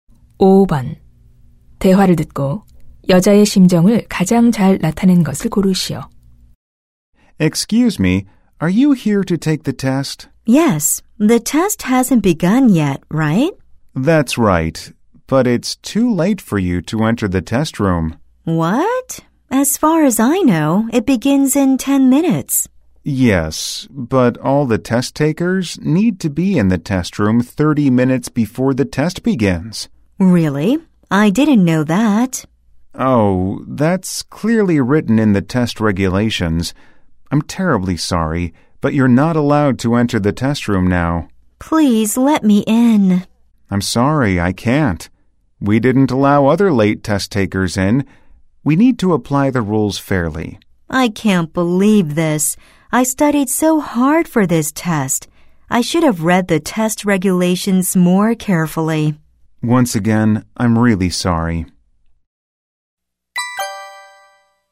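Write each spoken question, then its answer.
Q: 대화를 듣고 여자의 심정을 가장 잘 나타낸 것을 고르시오.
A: 실망하고 후회함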